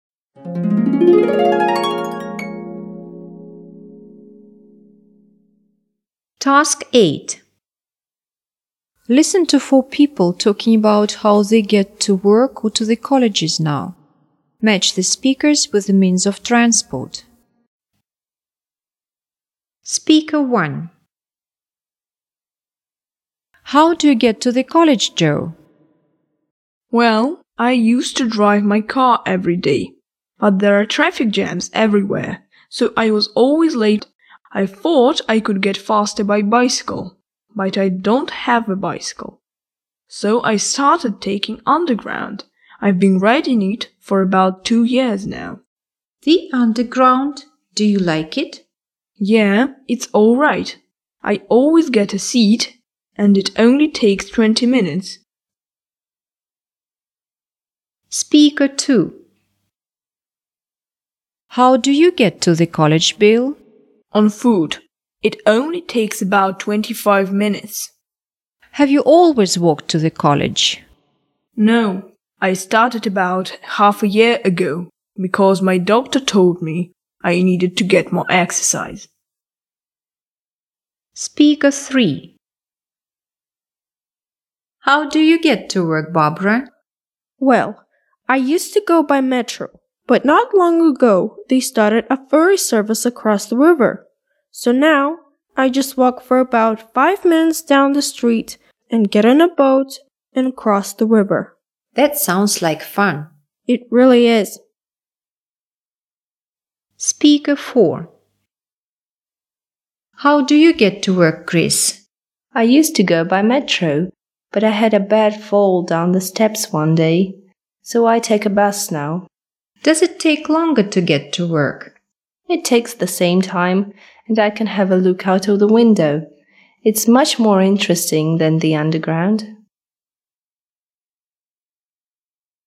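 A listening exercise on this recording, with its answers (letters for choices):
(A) on foot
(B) by bus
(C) by underground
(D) by boat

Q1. Speaker 1.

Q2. Speaker 2.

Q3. Speaker 3.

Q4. Speaker 4.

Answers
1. C
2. A
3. D
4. B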